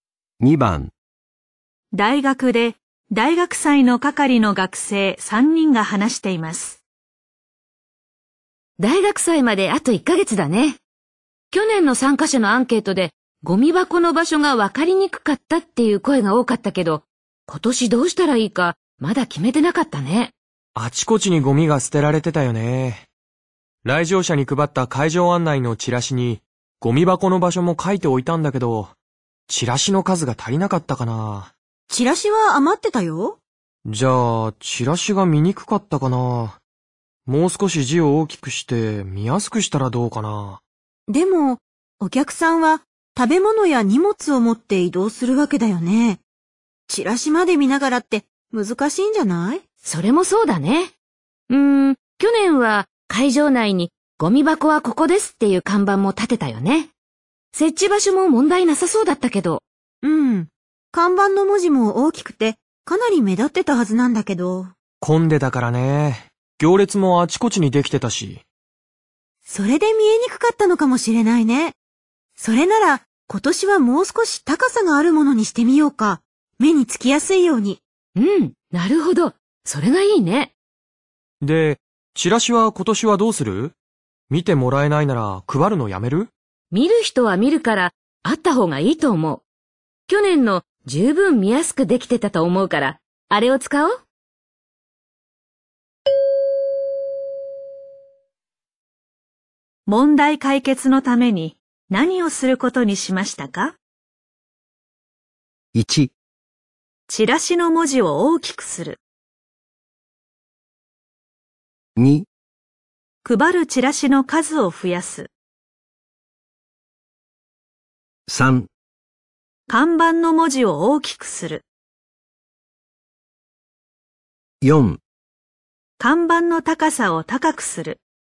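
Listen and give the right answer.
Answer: 4: 看板の高さを高くする。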